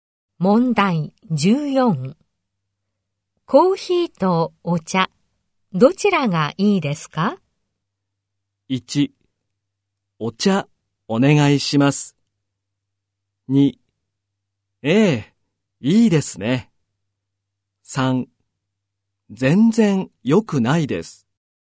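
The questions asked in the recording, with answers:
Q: コーヒーとお茶、どちらがいいですか?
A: 1: お茶、お願いします。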